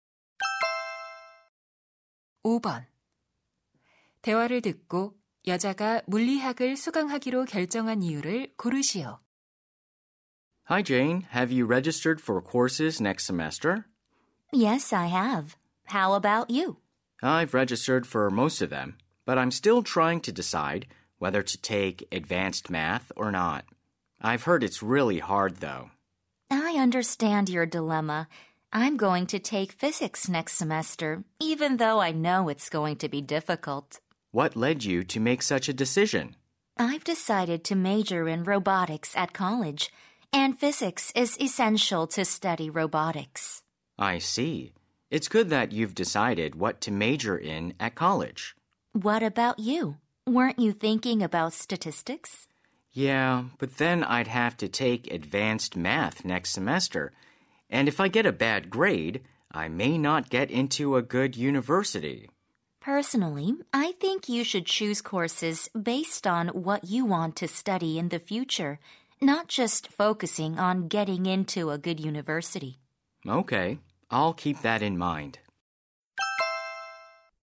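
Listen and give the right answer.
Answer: 대학에서 로봇공학을 전공하려는데 물리학이 필수라서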